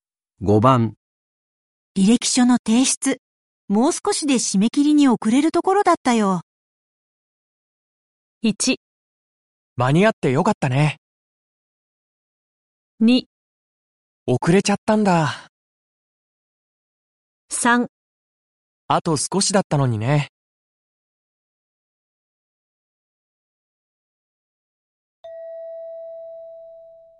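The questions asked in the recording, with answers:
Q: 履歴書の提出、もう少しで締め切りに遅れるところだったよ。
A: 1: 間に合ってよかったね。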